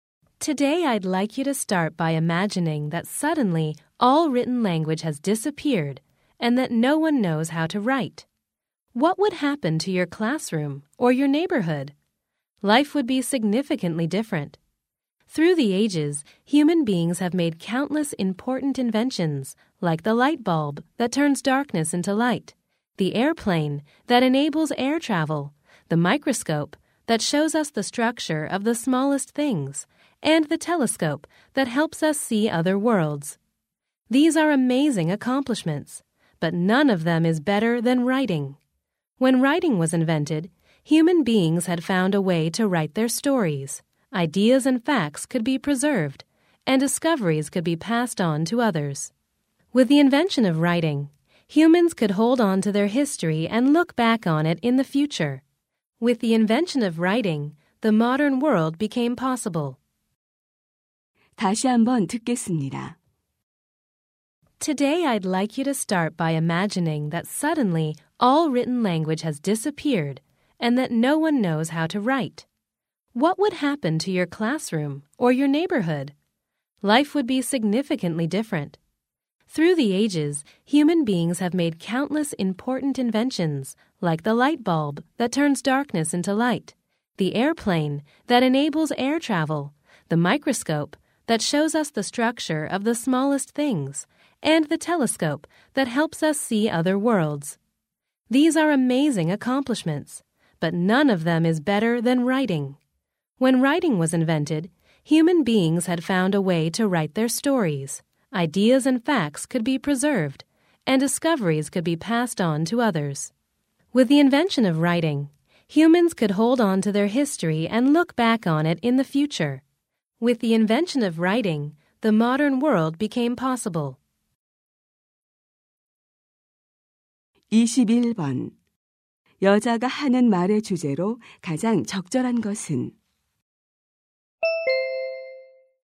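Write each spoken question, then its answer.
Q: 여자가 하는 말의 주제로 가장 적절한 것은?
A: 인류 최고의 발명품인 문자(글쓰기)의 중요성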